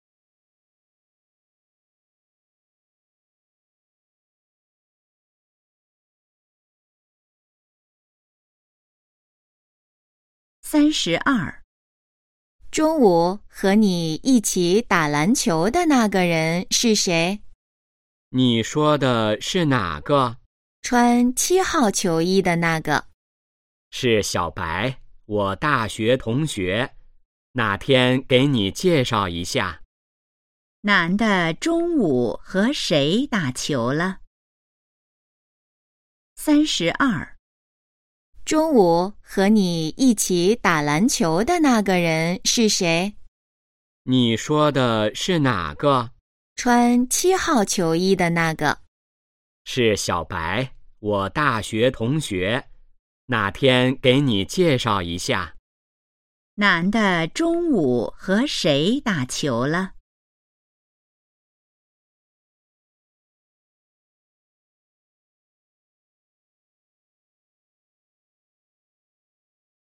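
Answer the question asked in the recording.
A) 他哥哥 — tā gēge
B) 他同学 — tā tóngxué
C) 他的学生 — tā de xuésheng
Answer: B) 他同学 — tā tóngxué

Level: HSK2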